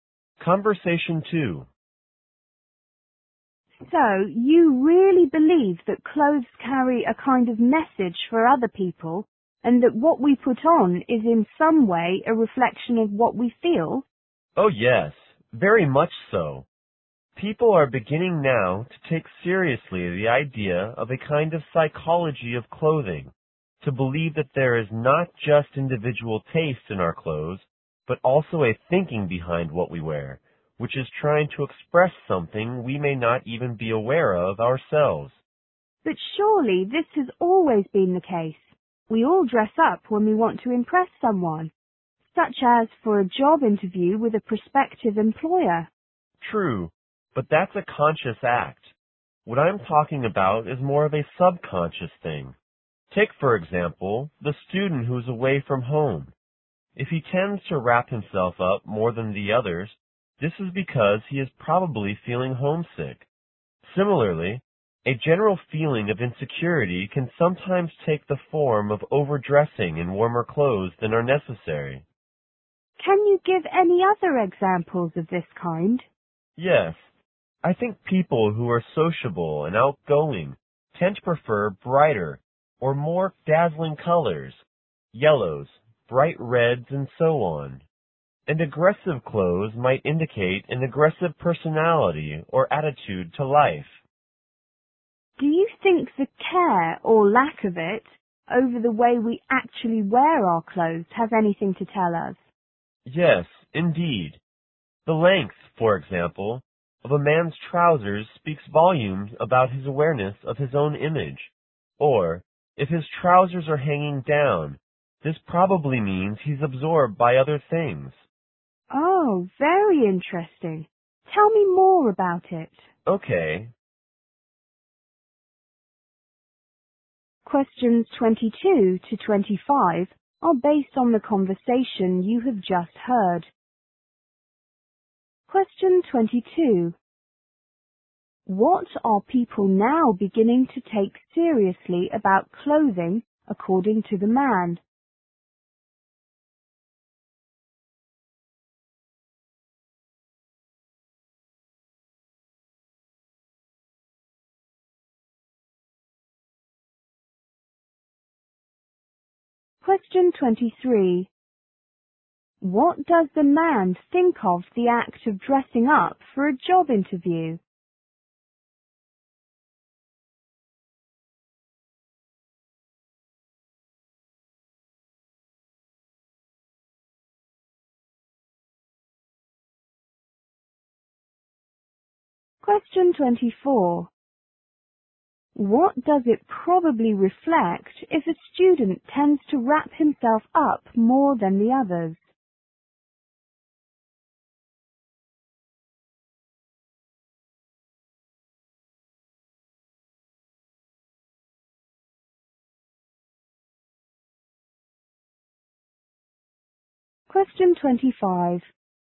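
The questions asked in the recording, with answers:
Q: What are people now beginning to take seriously about clothing, according to the man?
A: The idea of a psychology of clothing.

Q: What does the man think of the act of dressing up for a job interview?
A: It is a conscious act.

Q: What does it probably reflect if a student tends to wrap himself up more than the others?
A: He is probably feeling homesick.

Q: What sort of clothes do those people who are sociable and outgoing often prefer?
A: Clothes in bright, dazzling colors.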